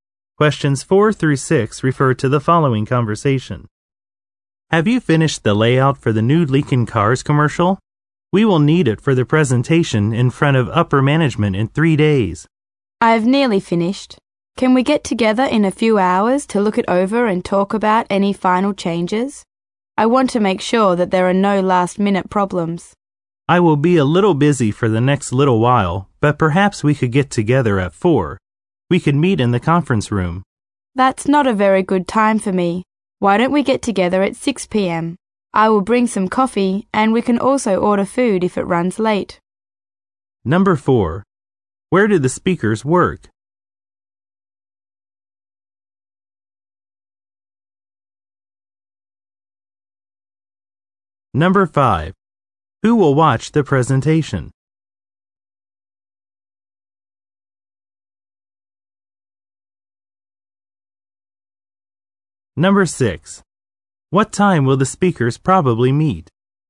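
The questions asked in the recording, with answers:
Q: Who will watch the presentation?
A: Upper management

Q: What time will the speakers probably meet?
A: 6 p.m.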